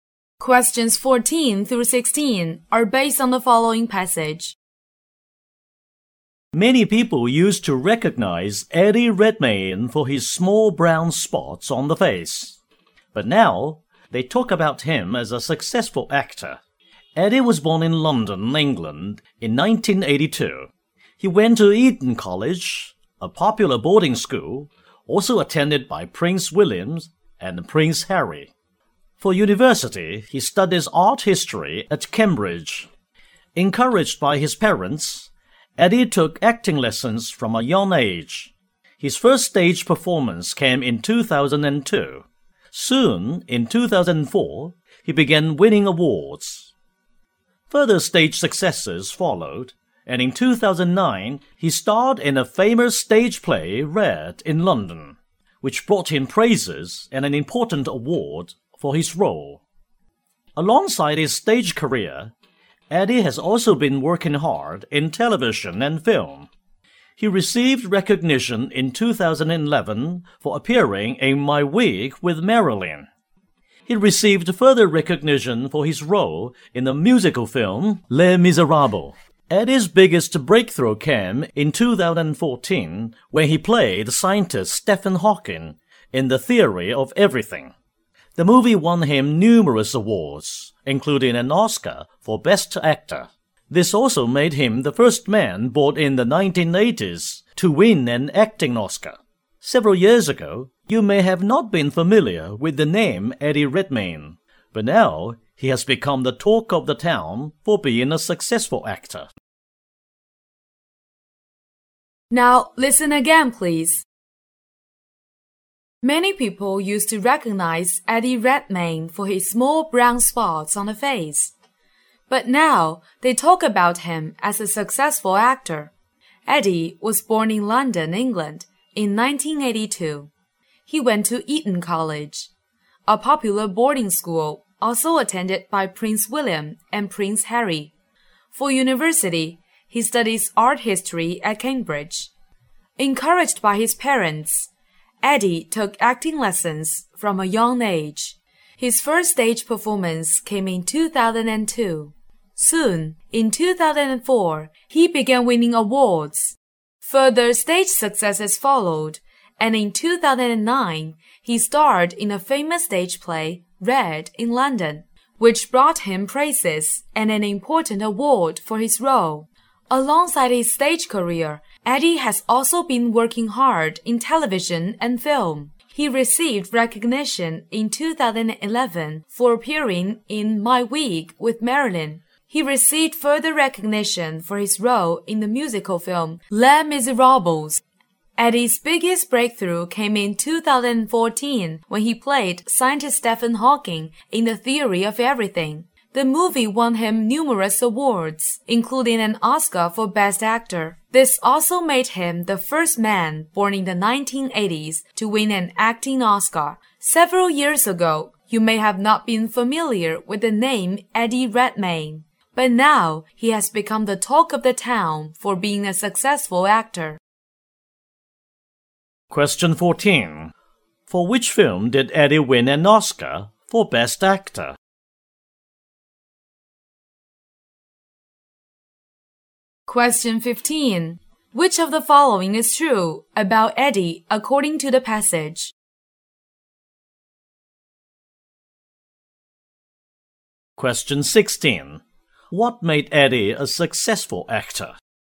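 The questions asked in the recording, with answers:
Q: For which film did Eddie win an Oscar for Best Actor?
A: The Theory of Everything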